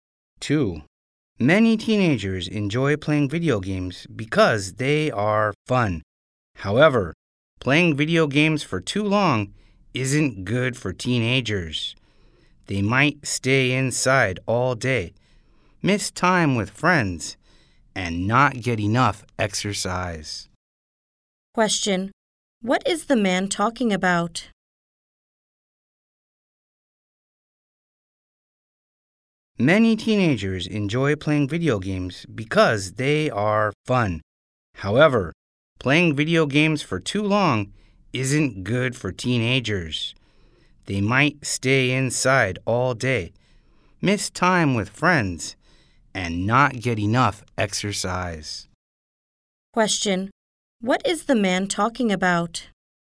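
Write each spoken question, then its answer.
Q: What is the man talking about?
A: Playing video games too long isn't good for teenagers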